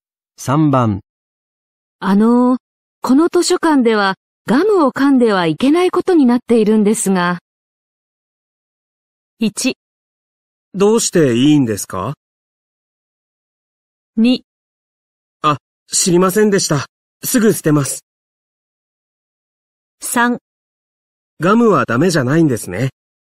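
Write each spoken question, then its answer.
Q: この図書館ではガムを噛んではいけないことになっているんですが。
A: 2: あ、知りませんでした。すぐ捨てます。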